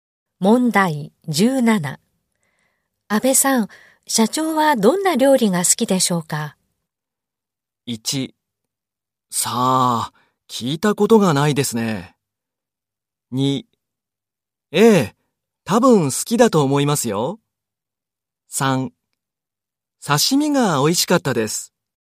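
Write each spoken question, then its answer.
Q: 安倍さん、社長はどんな料理が好きでしょうか?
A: 1: さあ、聞いたことがないですね。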